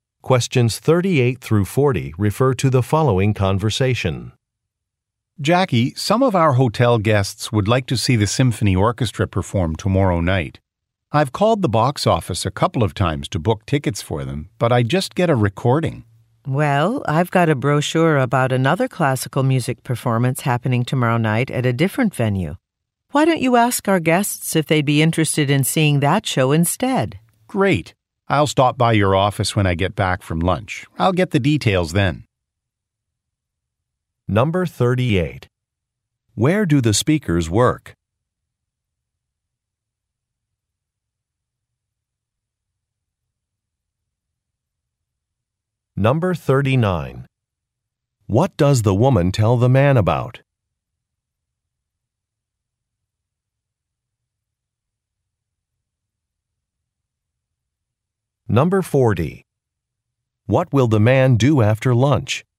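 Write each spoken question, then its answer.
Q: Where do the speakers work?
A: At a hotel

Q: What does the woman tell the man about?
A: Another classical music performance at a different venue

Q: What will the man do after lunch?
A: Stop by the woman's office to get the details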